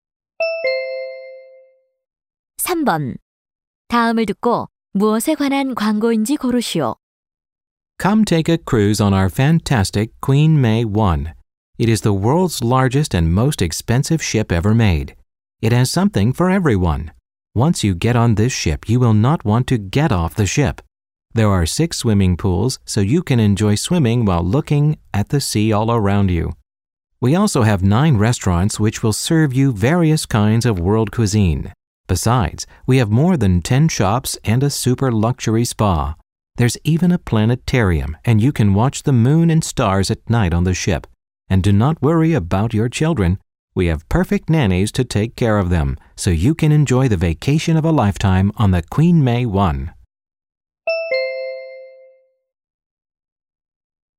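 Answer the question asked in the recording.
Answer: 유람선 여행 (Queen May 1 크루즈)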